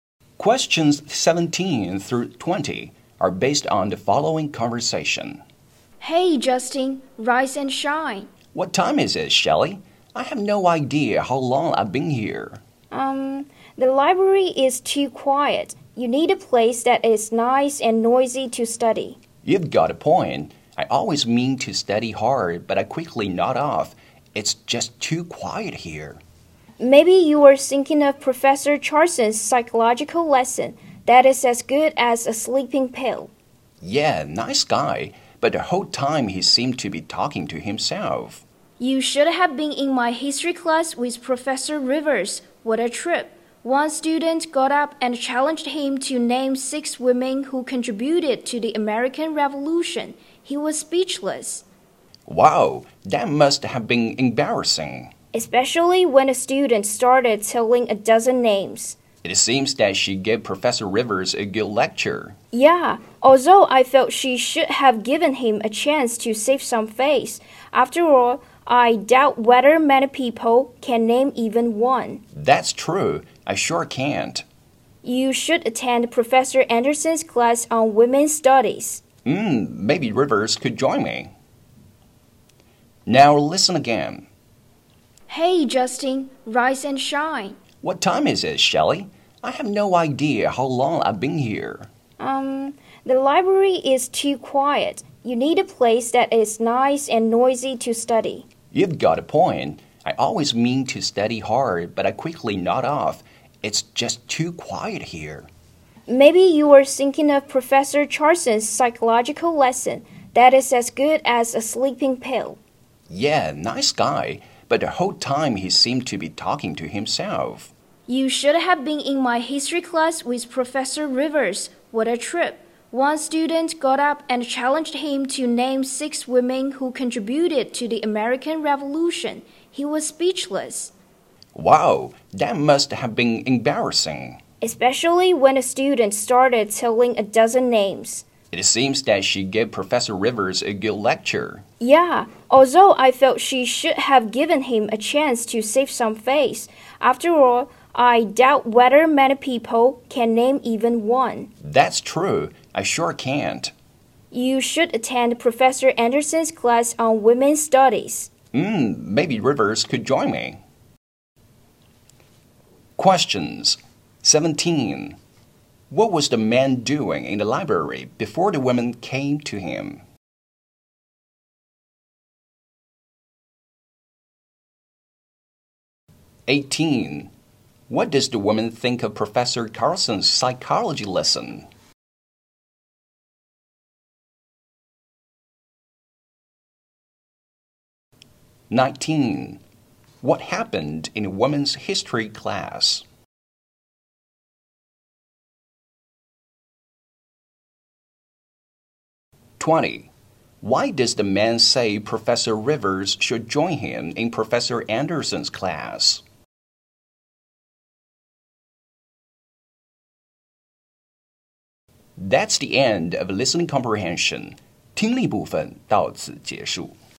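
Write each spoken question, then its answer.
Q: What was the man doing in the library before the women came to him?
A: Sleeping

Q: What does the woman think of Professor Carlson's psychology lesson?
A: It is boring

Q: What happened in a woman's history class?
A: A student named a dozen women from the American Revolution when the professor couldn't name any

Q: Why does the man say Professor Rivers should join him in Professor Anderson's class?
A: Rivers needs to learn about women's role in history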